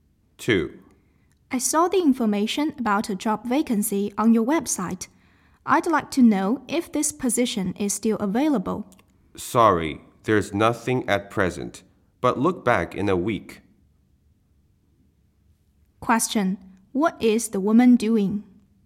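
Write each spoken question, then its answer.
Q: What is the woman doing?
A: Asking about a job vacancy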